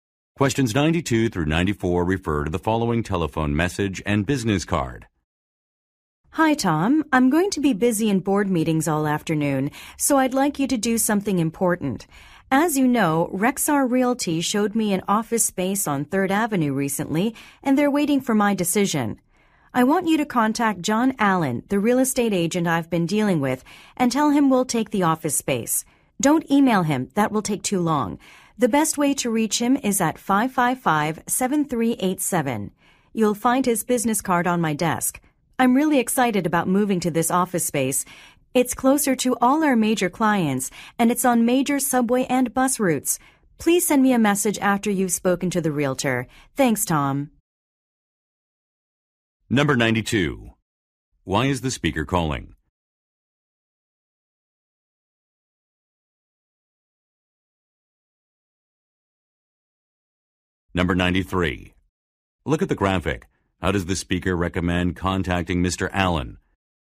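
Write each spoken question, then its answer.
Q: Why is the speaker calling?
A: To ask Tom to tell the agent they will take the office space

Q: What does the speaker imply about the office space?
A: It is conveniently located near clients and transit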